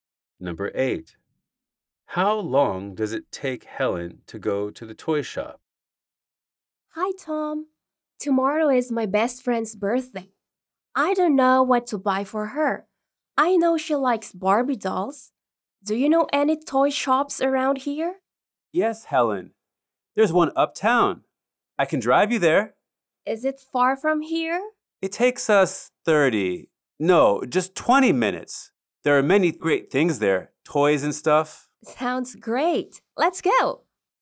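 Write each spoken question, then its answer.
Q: How long does it take Helen to go to the toy shop?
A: 20 minutes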